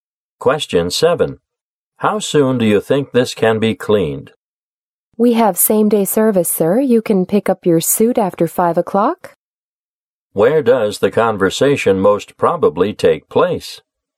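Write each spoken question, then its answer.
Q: Where does the conversation most probably take place?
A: At a dry cleaner's.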